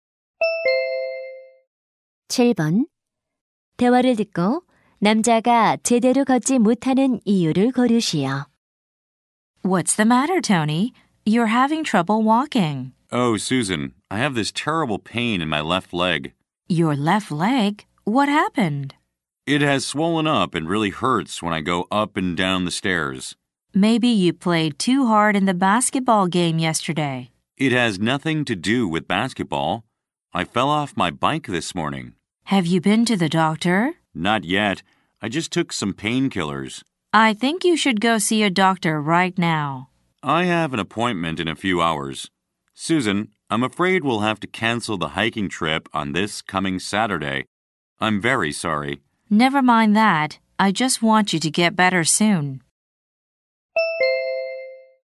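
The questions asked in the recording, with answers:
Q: 대화를 듣고 남자가 제대로 걷지 못하는 이유를 고르시오.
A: 오늘 아침 자전거에서 떨어져서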